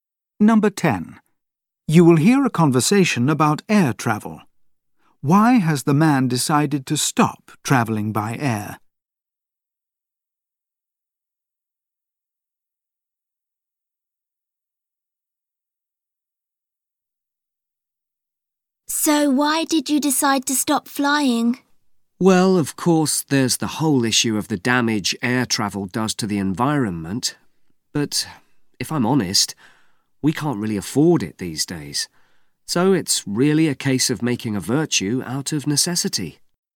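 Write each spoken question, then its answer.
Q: Why has the man decided to stop travelling by air?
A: He can't afford it any more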